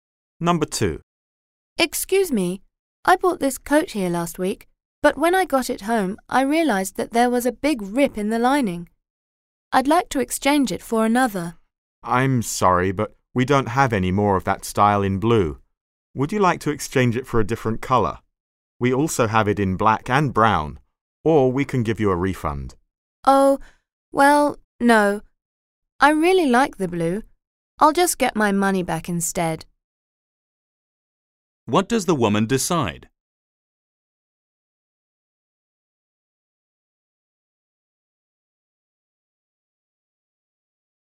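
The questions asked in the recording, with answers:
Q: What does the woman decide?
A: To get a refund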